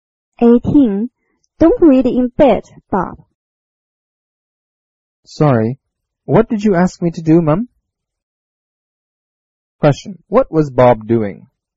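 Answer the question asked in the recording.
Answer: Reading in bed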